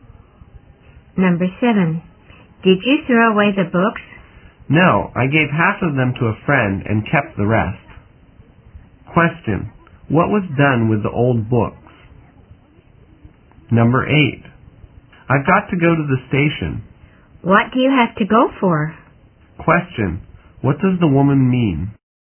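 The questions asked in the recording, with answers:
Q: What was done with the old books?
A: Half were given to a friend and the rest were kept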